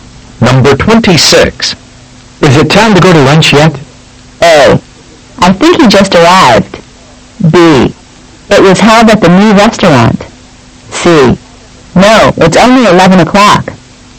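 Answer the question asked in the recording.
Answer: C: No, it's only 11 o'clock.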